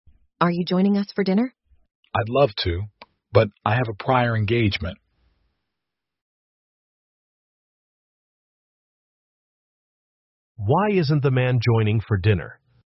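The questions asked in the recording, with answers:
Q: Why isn't the man joining for dinner?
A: He has a prior engagement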